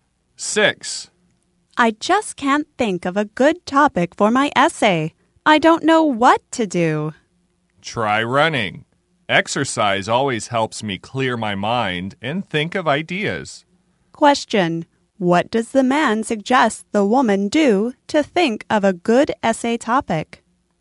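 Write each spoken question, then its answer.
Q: What does the man suggest the woman do to think of a good essay topic?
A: Try running (exercise)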